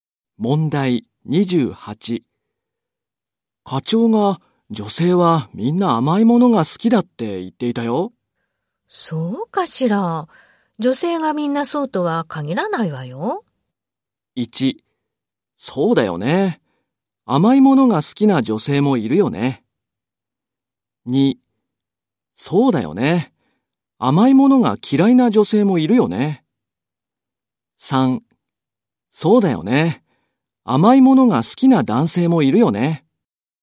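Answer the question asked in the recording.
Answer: 2: そうだよね。甘いものが嫌いな女性もいるよね。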